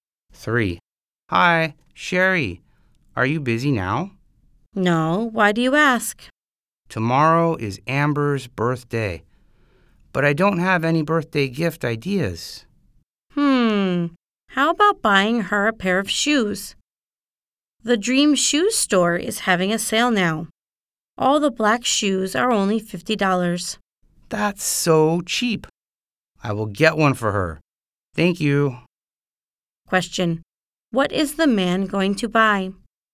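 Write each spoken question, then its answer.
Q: What is the man going to buy?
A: A pair of black shoes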